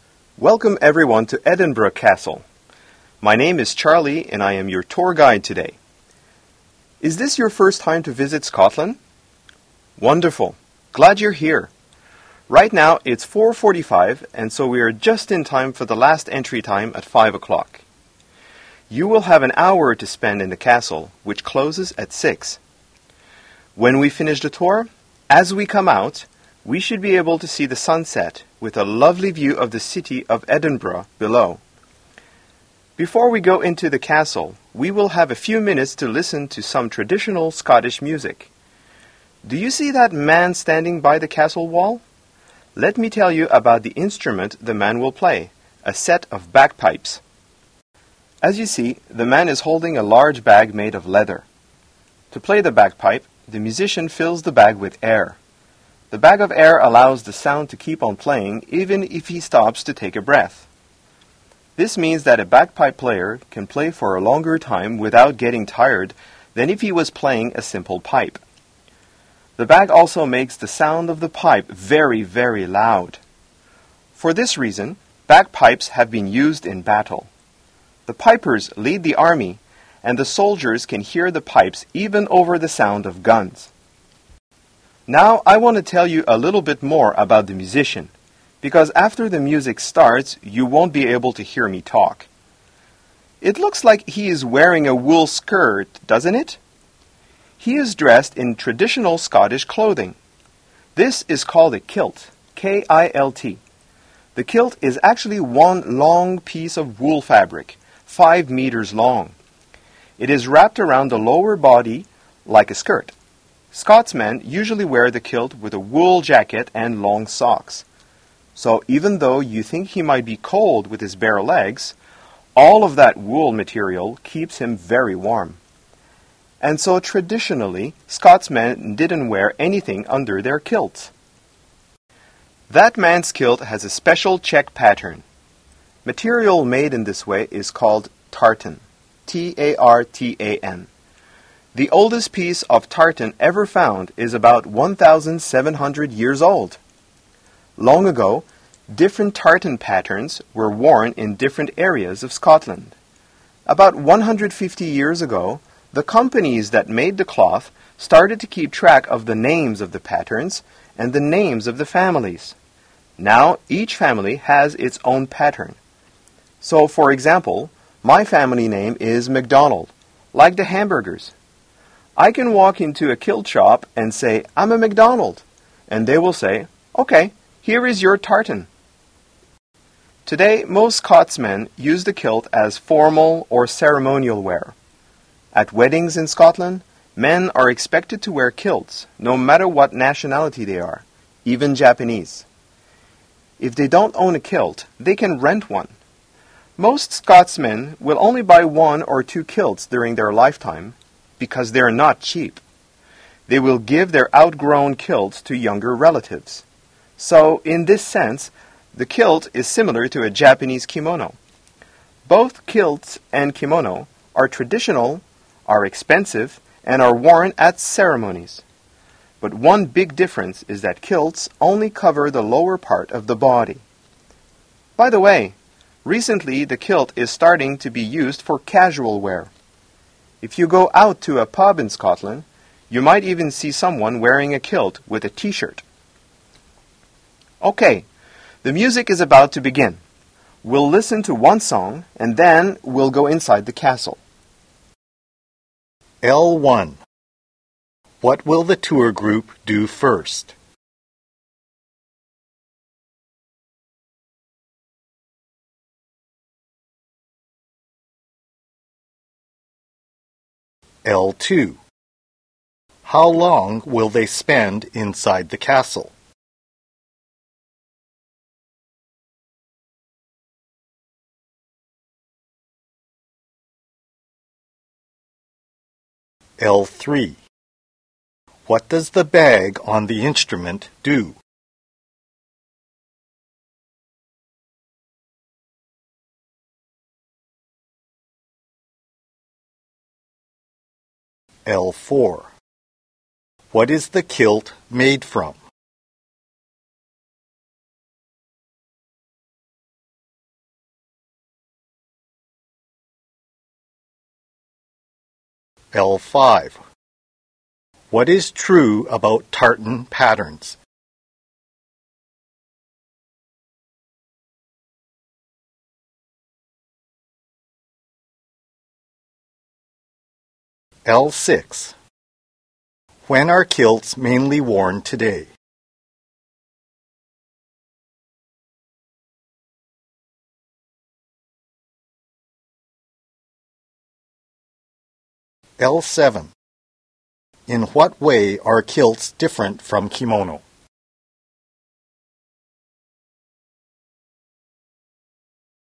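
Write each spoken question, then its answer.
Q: What will the tour group do first?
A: Listen to traditional Scottish bagpipe music

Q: How long will they spend inside the castle?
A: An hour

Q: What is the kilt made from?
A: Wool

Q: When are kilts mainly worn today?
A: On formal or ceremonial occasions, such as weddings

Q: In what way are kilts different from kimono?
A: Kilts only cover the lower part of the body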